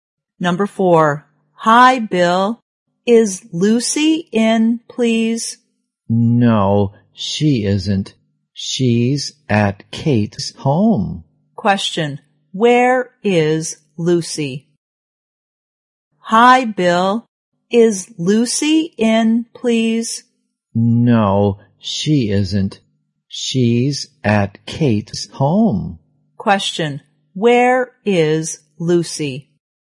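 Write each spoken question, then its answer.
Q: where is Lucy?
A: At Kate's home.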